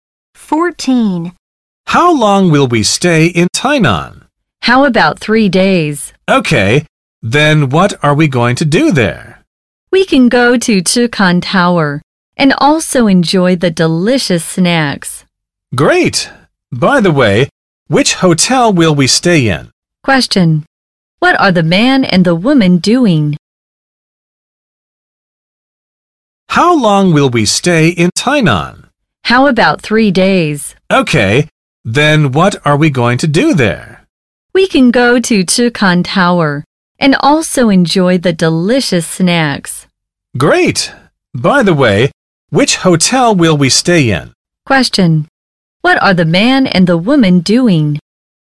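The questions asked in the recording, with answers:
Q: What are the man and the woman doing?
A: Planning a trip to Tainan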